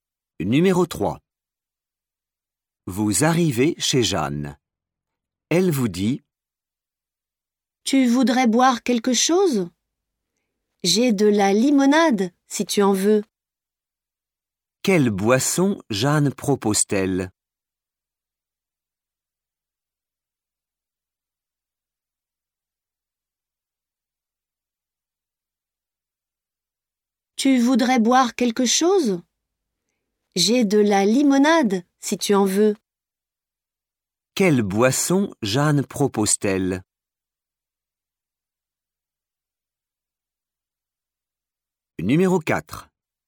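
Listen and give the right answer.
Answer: de la limonade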